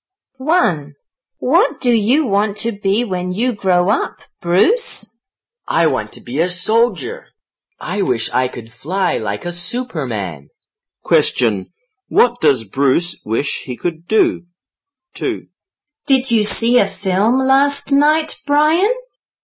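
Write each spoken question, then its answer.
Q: What does Bruce wish he could do?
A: Fly like a Superman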